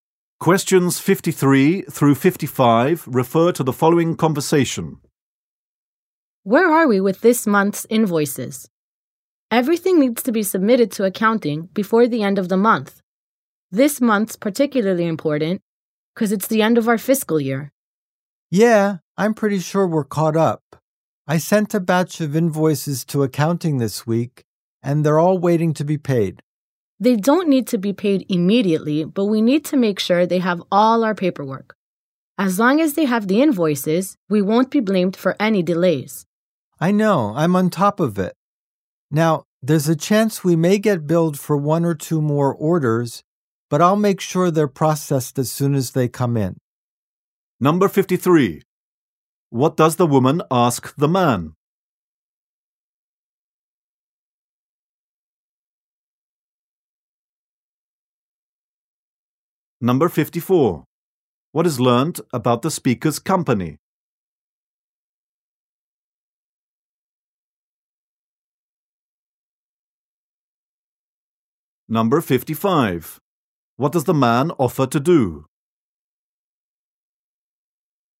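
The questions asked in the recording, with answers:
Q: What does the woman ask the man?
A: Where they are with this month's invoices

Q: What is learnt about the speaker's company?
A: Its fiscal year ends this month

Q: What does the man offer to do?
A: Process any new bills as soon as they come in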